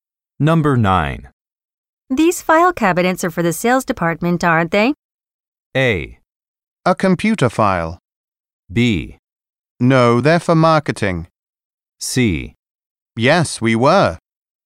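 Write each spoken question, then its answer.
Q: These file cabinets are for the sales department, aren't they?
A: B: No, they're for marketing.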